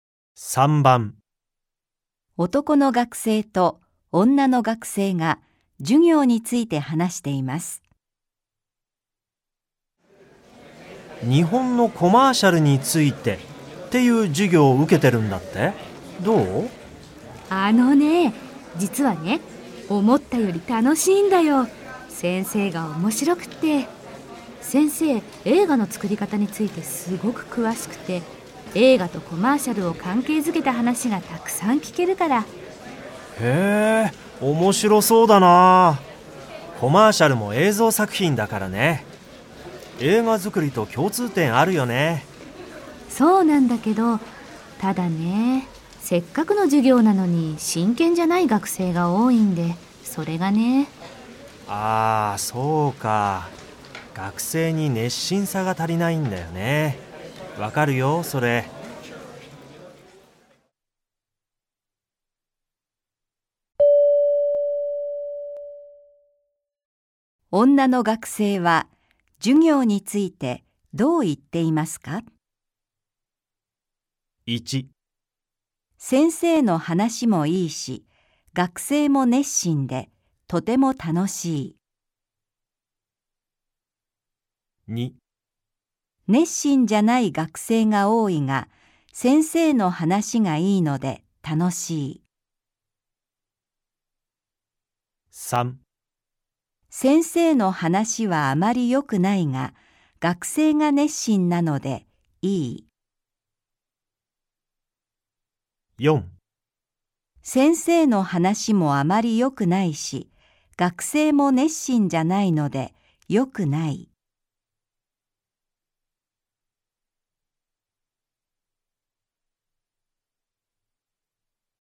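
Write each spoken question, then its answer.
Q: 女の学生は授業についてどう言っていますか?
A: 2: 熱心じゃない学生が多いが、先生の話がいいので楽しい。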